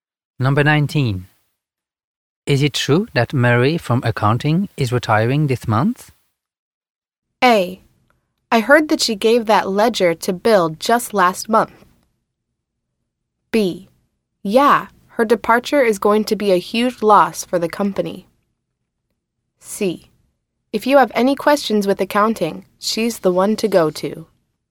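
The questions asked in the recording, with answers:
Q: Is it true that Mary from accounting is retiring this month?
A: B: Yeah, her departure is going to be a huge loss for the company.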